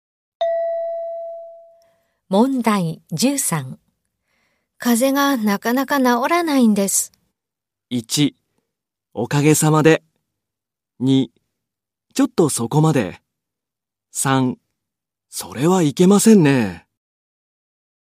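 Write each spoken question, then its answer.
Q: 風邪がなかなか治らないんです。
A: 3: それはいけませんね。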